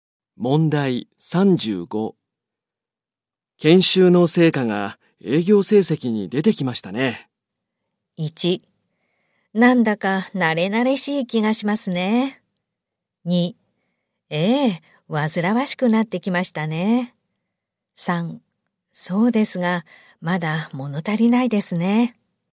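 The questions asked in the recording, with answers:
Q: 研修の成果が営業成績に出てきましたね。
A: 3: そうですが、まだ物足りないですね。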